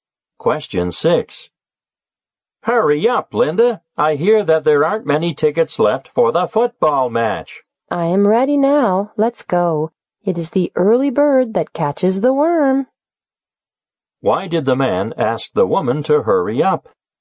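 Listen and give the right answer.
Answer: There aren't many tickets left for the football match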